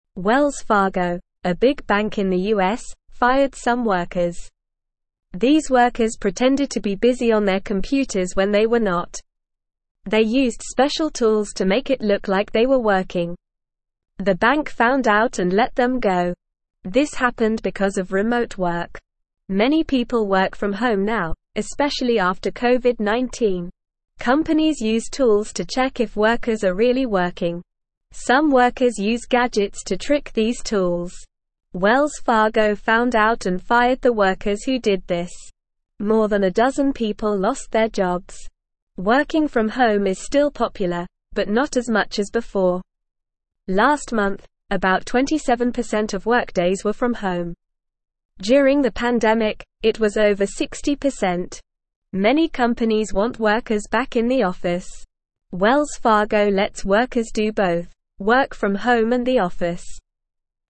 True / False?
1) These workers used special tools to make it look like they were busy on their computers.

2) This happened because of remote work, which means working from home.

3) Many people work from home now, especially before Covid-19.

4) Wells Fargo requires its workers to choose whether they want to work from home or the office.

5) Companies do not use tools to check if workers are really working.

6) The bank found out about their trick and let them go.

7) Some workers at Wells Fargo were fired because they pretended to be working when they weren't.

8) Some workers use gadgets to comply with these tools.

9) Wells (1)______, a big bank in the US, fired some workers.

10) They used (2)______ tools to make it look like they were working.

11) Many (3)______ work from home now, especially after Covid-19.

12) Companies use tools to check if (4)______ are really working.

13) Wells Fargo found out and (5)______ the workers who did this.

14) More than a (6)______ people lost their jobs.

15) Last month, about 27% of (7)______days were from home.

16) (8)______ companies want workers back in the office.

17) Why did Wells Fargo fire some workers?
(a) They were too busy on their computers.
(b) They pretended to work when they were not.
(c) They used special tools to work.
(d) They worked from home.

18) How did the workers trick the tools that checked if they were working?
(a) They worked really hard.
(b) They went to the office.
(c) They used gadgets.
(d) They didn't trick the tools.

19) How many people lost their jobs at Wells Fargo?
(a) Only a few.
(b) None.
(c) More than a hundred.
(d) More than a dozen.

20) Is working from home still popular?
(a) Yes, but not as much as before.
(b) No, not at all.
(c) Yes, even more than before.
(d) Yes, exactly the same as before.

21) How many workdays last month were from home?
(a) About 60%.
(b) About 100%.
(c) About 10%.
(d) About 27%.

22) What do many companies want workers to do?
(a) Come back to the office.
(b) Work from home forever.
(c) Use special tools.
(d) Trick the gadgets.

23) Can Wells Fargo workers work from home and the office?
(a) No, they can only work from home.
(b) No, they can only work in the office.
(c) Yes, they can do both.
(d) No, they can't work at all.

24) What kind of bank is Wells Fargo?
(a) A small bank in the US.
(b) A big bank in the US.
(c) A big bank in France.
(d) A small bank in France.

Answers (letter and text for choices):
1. True
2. True
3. False
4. False
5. False
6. True
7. True
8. False
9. Fargo
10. special
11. people
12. workers
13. fired
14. dozen
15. work
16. Many
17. (b) They pretended to work when they were not.
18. (c) They used gadgets.
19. (d) More than a dozen.
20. (a) Yes, but not as much as before.
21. (d) About 27%.
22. (a) Come back to the office.
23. (c) Yes, they can do both.
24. (b) A big bank in the US.

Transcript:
Wells Fargo, a big bank in the US, fired some workers. These workers pretended to be busy on their computers when they were not. They used special tools to make it look like they were working. The bank found out and let them go. This happened because of remote work.
Many people work from home now, especially after Covid-19. Companies use tools to check if workers are really working. Some workers use gadgets to trick these tools. Wells Fargo found out and fired the workers who did this. More than a dozen people lost their jobs.
Working from home is still popular, but not as much as before. Last month, about 27% of workdays were from home. During the pandemic, it was over 60%. Many companies want workers back in the office. Wells Fargo lets workers do both, work from home and the office.

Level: Level 1